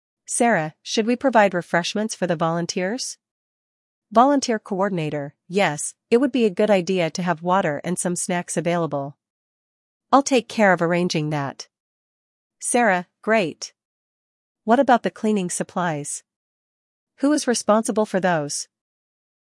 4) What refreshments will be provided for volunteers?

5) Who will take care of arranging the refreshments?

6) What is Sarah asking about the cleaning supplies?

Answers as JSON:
{"4": "Water and snacks.", "5": "The coordinator will arrange the refreshments.", "6": "Sarah asks who will arrange the cleaning supplies."}

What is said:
Sarah: Should we provide refreshments for the volunteers?
Volunteer Coordinator: Yes, it would be a good idea to have water and some snacks available. I'll take care of arranging that.
Sarah: Great! What about the cleaning supplies? Who is responsible for those?